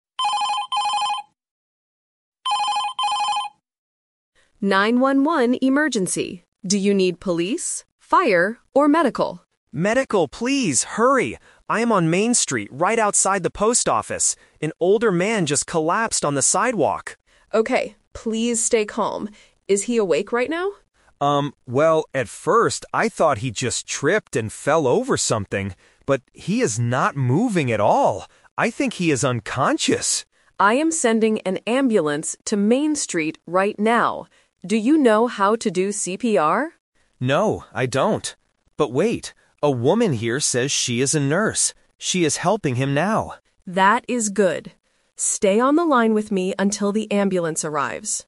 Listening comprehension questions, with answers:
Listen to the conversation and circle the correct answer (A, B, or C).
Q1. Where is the caller right now?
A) At the police station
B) Outside the post office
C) Inside the hospital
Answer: Outside the post office

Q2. What did the caller first think happened to the man?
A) He tripped and fell.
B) He had a heart attack.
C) He was sleeping on the street.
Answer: He tripped and fell.

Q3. Who is doing CPR to help the old man?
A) The caller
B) The dispatcher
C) A nurse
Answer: A nurse

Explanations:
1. The caller says, "I am on Main Street, right outside the post office." Option (A) is a trap because the dispatcher mentions "police" at the beginning of the call. Option (C) is plausible for a medical emergency but is not where the caller is.
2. This is "The Twist". The caller says, "at first I thought he just tripped and fell over something." Options (B) and (C) are plausible guesses in real life but are not mentioned in the audio.
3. The caller says, "a woman here says she is a nurse. She is helping him now." Option (A) is a trap because the dispatcher asks the caller to do CPR, but the caller says "No, I don't". Option (B) is wrong because the dispatcher is on the phone, not at the scene.

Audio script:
Dispatcher: 911 emergency. Do you need police, fire, or medical?
Caller: Medical, please! Hurry! I am on Main Street, right outside the post office. An older man just collapsed on the sidewalk!
Dispatcher: Okay, please stay calm. Is he awake right now?
Caller: Um, well, at first I thought he just tripped and fell over something. But he is not moving at all. I think he is unconscious!
Dispatcher: I am sending an ambulance to Main Street right now. Do you know how to do CPR?
Caller: No, I don't. But wait... a woman here says she is a nurse. She is helping him now.

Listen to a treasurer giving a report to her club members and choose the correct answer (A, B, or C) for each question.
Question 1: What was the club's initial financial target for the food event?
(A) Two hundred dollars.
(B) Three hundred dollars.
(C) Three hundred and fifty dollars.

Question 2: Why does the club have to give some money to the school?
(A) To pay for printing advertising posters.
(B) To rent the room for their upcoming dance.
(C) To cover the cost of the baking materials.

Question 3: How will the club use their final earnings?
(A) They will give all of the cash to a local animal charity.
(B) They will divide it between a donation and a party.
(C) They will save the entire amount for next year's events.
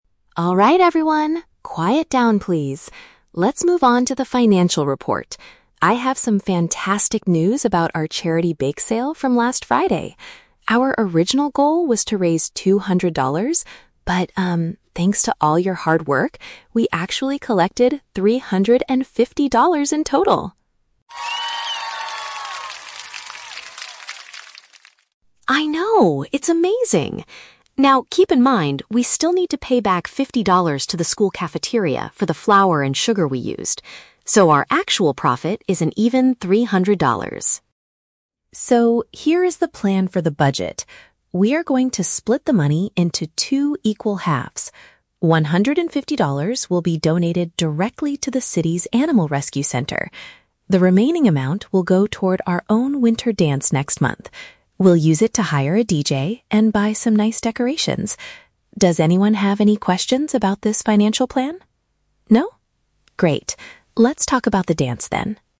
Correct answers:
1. Two hundred dollars.
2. To cover the cost of the baking materials.
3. They will divide it between a donation and a party.

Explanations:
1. Emma states that their "original goal" (initial financial target) was to raise two hundred dollars.
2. Emma explains they need to pay back fifty dollars for the "flour and sugar we used." Flour and sugar are baking materials.
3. The treasurer says they will "split the money into two equal halves." Half goes to an "animal rescue center" (donation) and the rest goes toward their "winter dance" (party).

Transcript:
Treasurer (Emma): Alright everyone, quiet down please! Let's move on to the financial report. I have some fantastic news about our charity bake sale from last Friday. Our original goal was to raise two hundred dollars, but, um, thanks to all your hard work, we actually collected three hundred and fifty dollars in total!
Treasurer (Emma): I know, it's amazing! Now, keep in mind, we still need to pay back fifty dollars to the school cafeteria for the flour and sugar we used. So, our actual profit is an even three hundred dollars.
So, here is the plan for the budget. We are going to split the money into two equal halves. One hundred and fifty dollars will be donated directly to the city's animal rescue center. The remaining amount will go toward our own winter dance next month. We'll use it to hire a DJ and buy some nice decorations. Does anyone have any questions about this financial plan? No? Great, let's talk about the dance then.

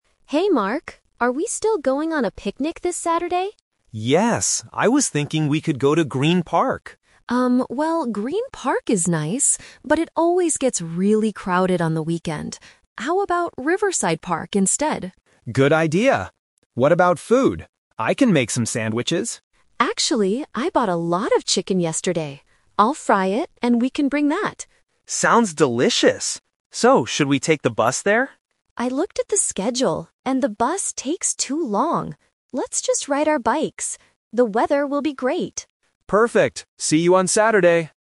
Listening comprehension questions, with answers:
Listen to the conversation between two friends and choose the correct answer (A, B, or C) for each question.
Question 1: Where will they go for the picnic?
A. Green Park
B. Riverside Park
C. City Park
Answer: Riverside Park

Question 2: What food will they bring?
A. Sandwiches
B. Hamburgers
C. Fried chicken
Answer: Fried chicken

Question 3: How will they travel to the park?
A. By bus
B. By bicycle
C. By car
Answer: By bicycle

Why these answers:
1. Mark suggests Green Park first (The Trap), but Sarah rejects it because it is too crowded. She suggests Riverside Park instead, and Mark agrees. City Park is not mentioned.
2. Mark offers to make sandwiches (The Trap), but Sarah changes the plan by saying she will bring fried chicken. Hamburgers are not mentioned in the conversation.
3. Mark asks if they should take the bus (The Trap). However, Sarah says the bus takes too long and suggests that they "ride our bikes," which means going by bicycle. A car is not mentioned.

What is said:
Sarah: Hey Mark, are we still going on a picnic this Saturday?
Mark: Yes! I was thinking we could go to Green Park.
Sarah: Um, well, Green Park is nice, but it always gets really crowded on the weekend. How about Riverside Park instead?
Mark: Good idea. What about food? I can make some sandwiches.
Sarah: Actually, I bought a lot of chicken yesterday. I'll fry it, and we can bring that.
Mark: Sounds delicious! So, should we take the bus there?
Sarah: I looked at the schedule, and the bus takes too long. Let's just ride our bikes. The weather will be great.

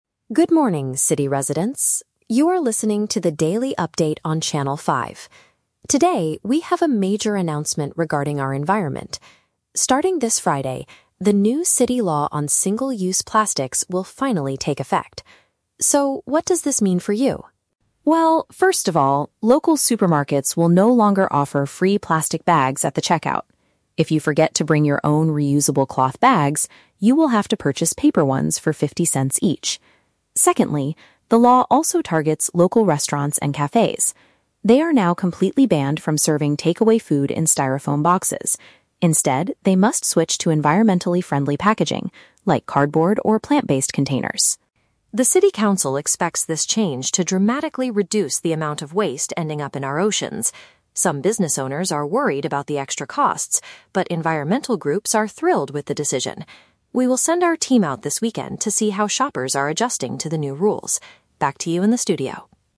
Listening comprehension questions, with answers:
Listen to the morning news report about a new environmental law, then choose the correct answer (A, B, or C) for each question.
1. What will happen at grocery stores starting this Friday?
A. They will give out free reusable cloth bags to all shoppers.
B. Customers will have to pay money if they need bags from the store.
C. They will stop selling all single-use plastic items entirely.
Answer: Customers will have to pay money if they need bags from the store.

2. What change must food businesses make according to the new regulations?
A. They are not allowed to sell takeaway meals to customers anymore.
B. They must charge people extra money for styrofoam boxes.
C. They have to use delivery containers made from sustainable materials.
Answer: They have to use delivery containers made from sustainable materials.

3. How do different people feel about the new city law?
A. Some local merchants have concerns about the financial impact.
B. Environmental organizations believe it will cost too much money.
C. Shop owners are completely thrilled with the recent changes.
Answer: Some local merchants have concerns about the financial impact.

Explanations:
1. The reporter says that if you don't bring your own bags, "you will have to purchase paper ones for fifty cents each." Option (B) is a paraphrase of this rule. Option (A) is a trap; the audio mentions "reusable cloth bags," but you have to bring your own, the store doesn't give them for free. Option (C) is a trap; the ban is on free plastic bags at the checkout, not all plastic items in the whole store.
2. The reporter states that restaurants must switch to "environmentally friendly packaging, like cardboard or plant-based containers." Option (C) uses paraphrasing ("delivery containers" for "packaging", "sustainable materials" for "environmentally friendly"). Option (A) is a trap; they are banned from using styrofoam for takeaway food, but they can still sell takeaway meals. Option (B) is a trap; styrofoam is "completely banned," so they cannot use or charge for it at all.
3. The reporter mentions that "business owners are worried about the extra costs." Option (A) uses synonyms ("local merchants" for "business owners", "concerns about the financial impact" for "worried about extra costs"). Option (B) is a trap; the "extra costs" are a worry for business owners, not environmental organizations. Option (C) is a trap; the word "thrilled" is used in the audio, but it describes the environmental groups, not the shop owners.

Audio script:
News Reporter: Good morning, city residents. You are listening to the daily update on Channel 5. Today, we have a major announcement regarding our environment. Starting this Friday, the new city law on single-use plastics will finally take effect. So, what does this mean for you?
Well, first of all, local supermarkets will no longer offer free plastic bags at the checkout. If you forget to bring your own reusable cloth bags, you will have to purchase paper ones for fifty cents each. Secondly, the law also targets local restaurants and cafes. They are now completely banned from serving takeaway food in styrofoam boxes. Instead, they must switch to environmentally friendly packaging, like cardboard or plant-based containers.
The city council expects this change to dramatically reduce the amount of waste ending up in our oceans. Some business owners are worried about the extra costs, but environmental groups are thrilled with the decision. We will send our team out this weekend to see how shoppers are adjusting to the new rules. Back to you in the studio.

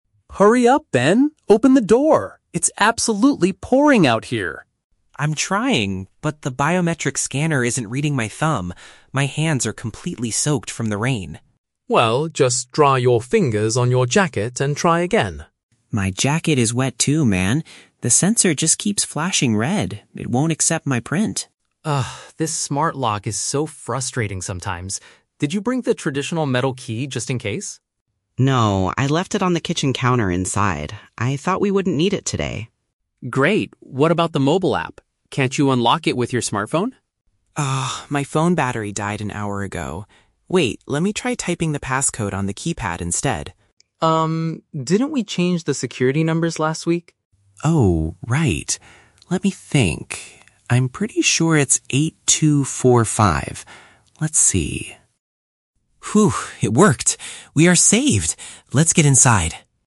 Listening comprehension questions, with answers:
Listen to a conversation between two roommates standing outside their home and choose the correct answer (A, B, or C) for each question.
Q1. Why is the smart lock refusing to open at first?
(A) The biometric machine is completely broken.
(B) The roommates forgot to charge the lock's battery.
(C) The user's fingers are covered in water.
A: The user's fingers are covered in water.

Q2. Where is the backup physical key located?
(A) It was left indoors before they went out.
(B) It was dropped and lost in the heavy rain.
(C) It is hidden under a plant near the front door.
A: It was left indoors before they went out.

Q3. How do the roommates finally manage to get inside their home?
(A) By using a software application on a cell phone.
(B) By entering a specific set of numbers on the device.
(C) By using the thumb scanner after drying their hands.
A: By entering a specific set of numbers on the device.

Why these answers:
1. Ben says that his hands are "completely soaked from the rain," which means his fingers are covered in water, causing the scanner to fail. Why the trap is wrong: Option (A) is the trap. The sensor "keeps flashing red" because it cannot read a wet thumb, but the machine itself is not broken. Option (B) is a plausible tech issue, but they talk about Ben's phone battery dying, not the lock's battery.
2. Ben admits that he "left it on the kitchen counter inside." "Indoors" is a paraphrase for being inside the house on the kitchen counter. Why the trap is wrong: Option (B) is the trap. The weather is rainy, but they did not drop or lose the key in the rain; they simply forgot to bring it. Option (C) is a common way people hide spare keys, but it is never mentioned in the audio.
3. Ben decides to try "typing the passcode on the keypad" and enters the numbers 8-2-4-5 to open the door. Why the trap is wrong: Option (A) is the trap. Mark suggests using the "mobile app" on the smartphone, but Ben says his phone battery died, so he cannot use this method. Option (C) is a trap because Ben's jacket was wet, so he couldn't dry his hands to use the thumb scanner.

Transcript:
Mark: Hurry up, Ben! Open the door! It's absolutely pouring out here.
Ben: I'm trying! But the biometric scanner isn't reading my thumb. My hands are completely soaked from the rain.
Mark: Well, just dry your fingers on your jacket and try again.
Ben: My jacket is wet too, man. The sensor just keeps flashing red. It won't accept my print.
Mark: Ugh, this smart lock is so frustrating sometimes. Did you bring the traditional metal key just in case?
Ben: No, I left it on the kitchen counter inside. I thought we wouldn't need it today.
Mark: Great. What about the mobile app? Can't you unlock it with your smartphone?
Ben: Ah, my phone battery died an hour ago. Wait, let me try typing the passcode on the keypad instead.
Mark: Um, didn't we change the security numbers last week?
Ben: Oh, right... Let me think. I'm pretty sure it's 8-2-4-5. Let's see...

